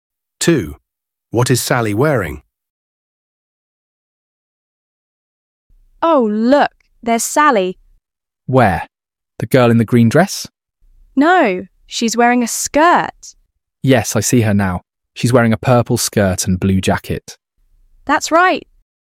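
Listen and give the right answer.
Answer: A purple skirt and a blue jacket.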